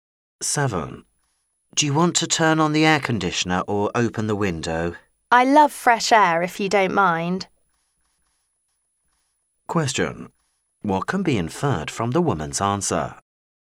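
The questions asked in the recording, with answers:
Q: What can be inferred from the woman's answer?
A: She would rather open the window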